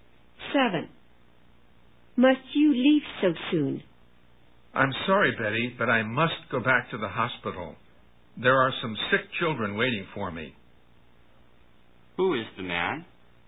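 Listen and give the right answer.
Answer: A doctor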